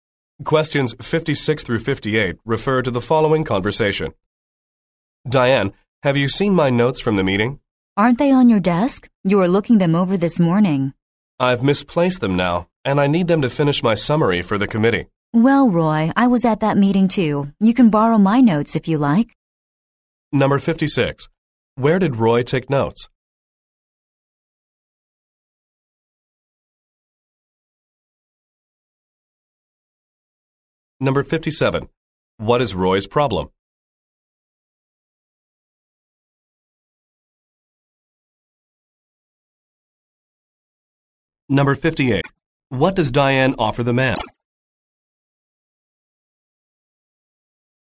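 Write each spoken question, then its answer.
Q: Where did Roy take notes?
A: At the meeting

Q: What is Roy's problem?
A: He misplaced his notes

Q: What does Diane offer the man?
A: Her notes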